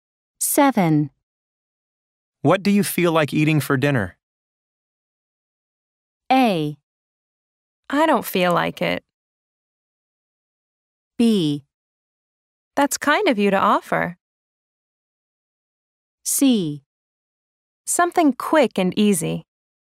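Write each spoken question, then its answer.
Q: What do you feel like eating for dinner?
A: C: Something quick and easy.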